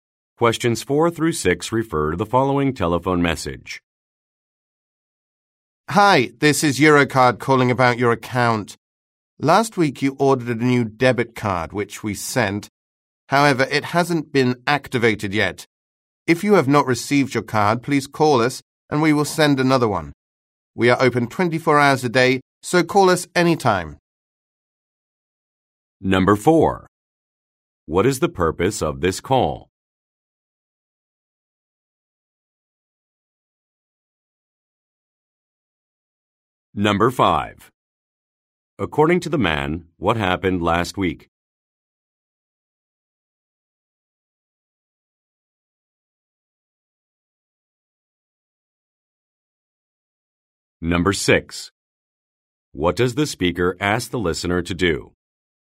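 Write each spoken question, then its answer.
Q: What is the purpose of this call?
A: The new debit card hasn't been activated yet

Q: According to the man, what happened last week?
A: The listener ordered a new debit card

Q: What does the speaker ask the listener to do?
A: Call if the card was not received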